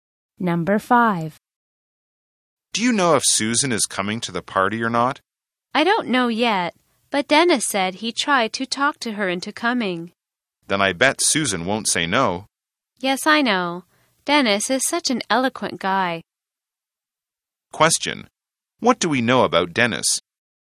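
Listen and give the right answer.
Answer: He is eloquent / good at persuading people.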